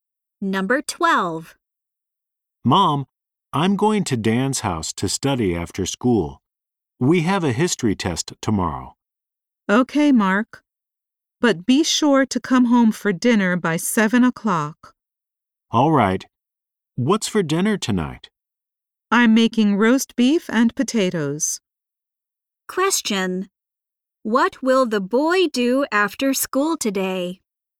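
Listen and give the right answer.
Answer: Study at Dan's house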